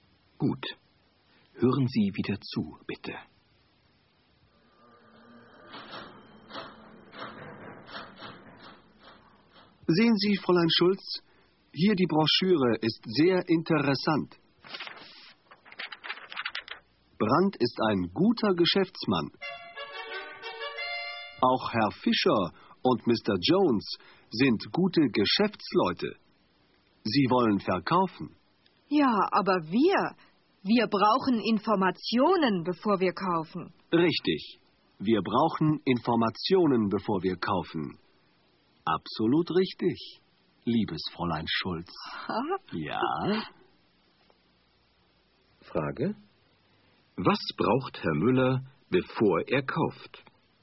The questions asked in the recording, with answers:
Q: Was braucht Herr Müller, bevor er kauft?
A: Er braucht Informationen, bevor er kauft.